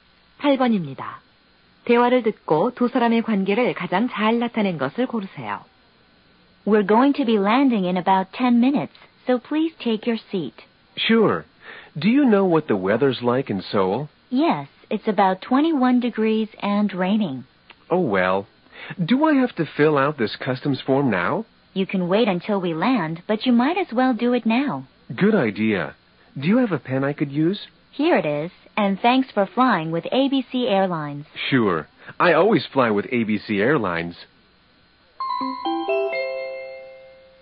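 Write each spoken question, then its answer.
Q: 대화를 듣고 두 사람의 관계를 가장 잘 나타낸 것을 고르세요.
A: 승무원과 승객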